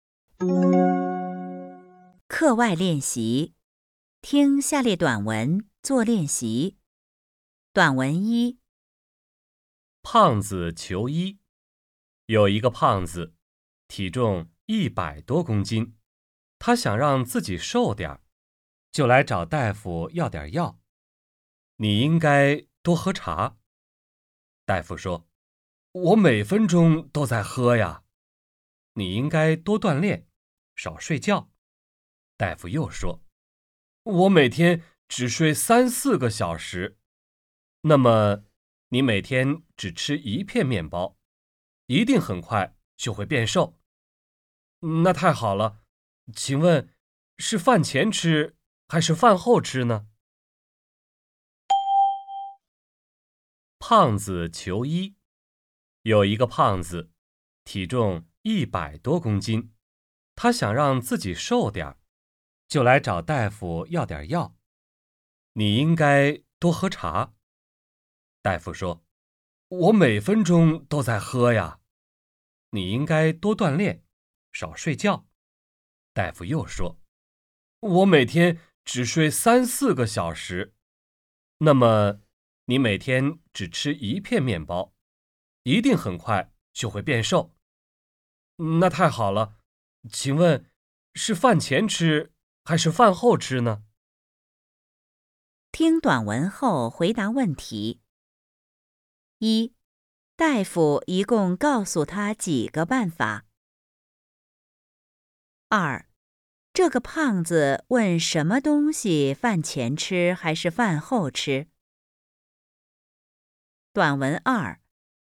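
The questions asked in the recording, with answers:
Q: 大夫一共告诉他几个办法?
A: 三个

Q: 这个胖子问什么东西饭前吃还是饭后吃?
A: 面包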